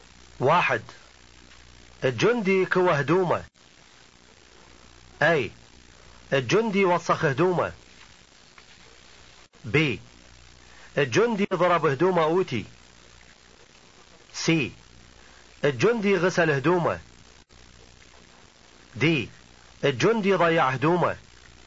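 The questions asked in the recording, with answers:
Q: واحد الجندي كوى هدومه.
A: B: الجندي ضرب هدومه اوتي.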